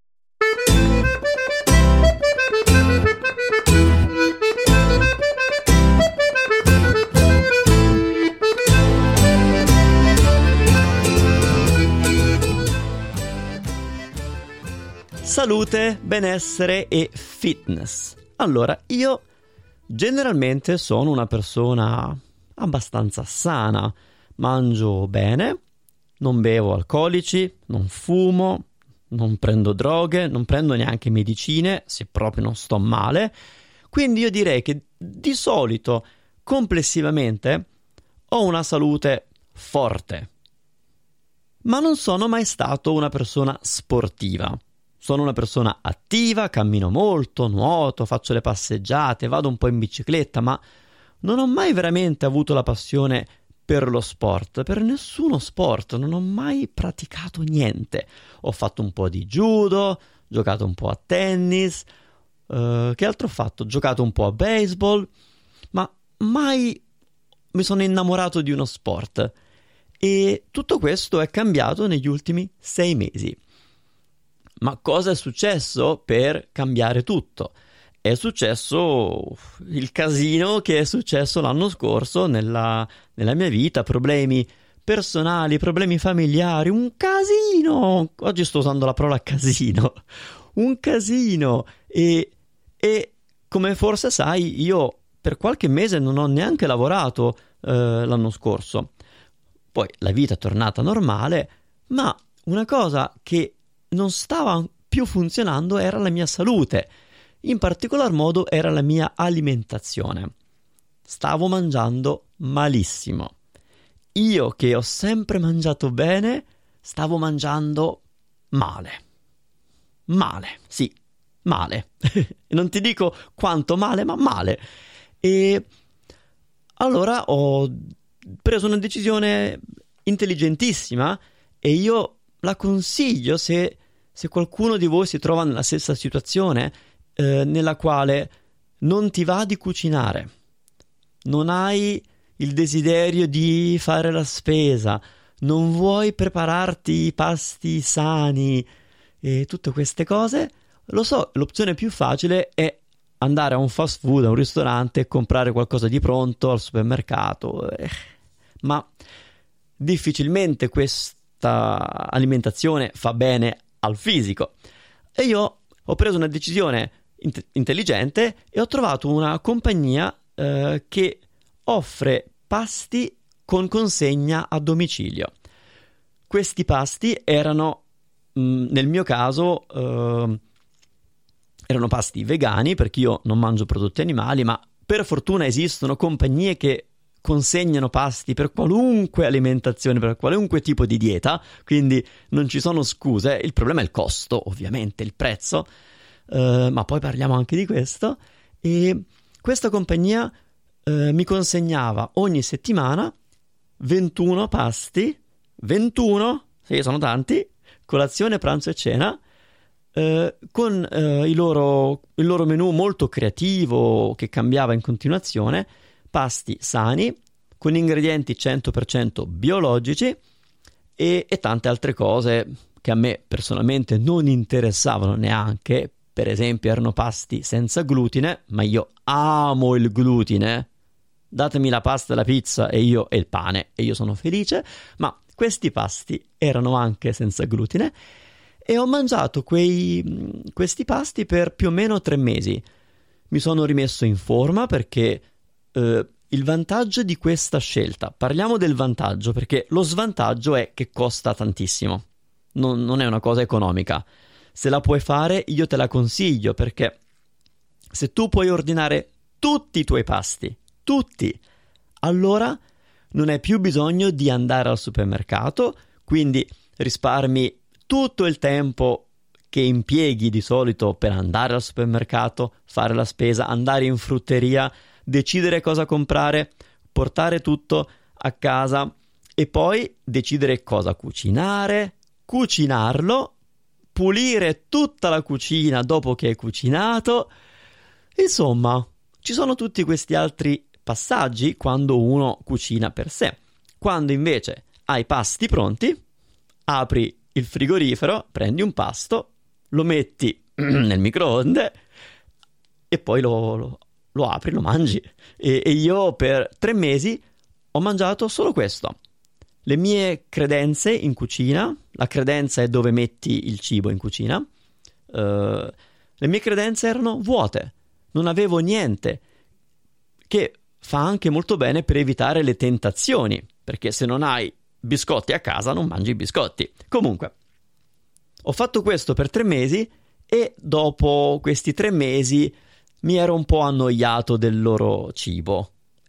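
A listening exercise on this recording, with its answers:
Here are your TRUE/ FALSE Comprehension questions.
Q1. Manu ha sempre adorato fare sport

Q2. Durante questi ultimi mesi Manu ha iniziato un nuovo percorso nel mondo della salute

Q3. Generalmente Manu ha una vita sana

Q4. L'anno scorso Manu ha avuto problemi personali e familiari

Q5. Manu ha iniziato a stare meglio grazie a un servizio di consegna di pasti a domicilio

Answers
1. Falso
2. Vero
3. Vero
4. Vero
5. Vero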